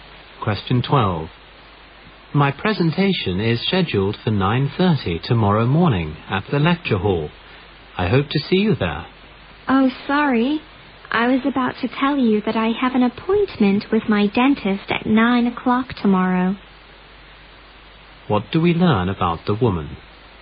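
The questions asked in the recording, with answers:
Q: What do we learn about the woman?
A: She can't attend the man's presentation because of a dentist appointment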